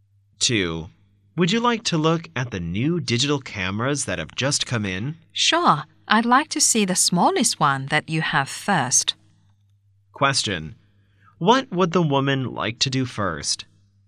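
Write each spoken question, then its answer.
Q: What would the woman like to do first?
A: See the smallest new digital camera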